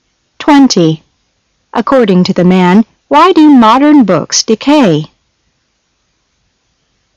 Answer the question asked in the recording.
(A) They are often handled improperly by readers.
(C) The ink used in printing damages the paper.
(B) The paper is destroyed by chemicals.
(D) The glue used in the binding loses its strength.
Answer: (B) The paper is destroyed by chemicals.